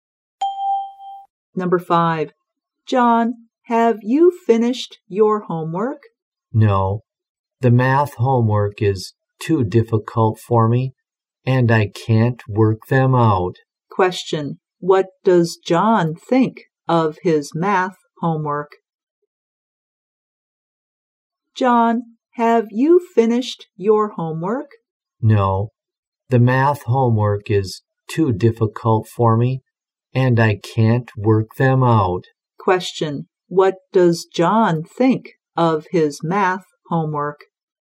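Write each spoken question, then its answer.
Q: What does John think of his math homework?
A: It is too difficult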